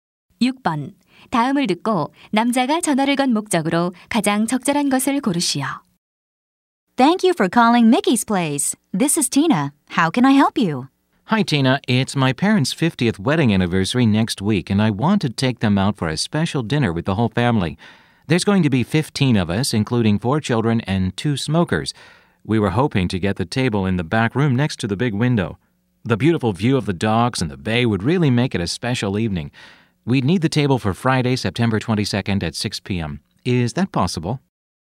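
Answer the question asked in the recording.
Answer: 저녁 식사 테이블 예약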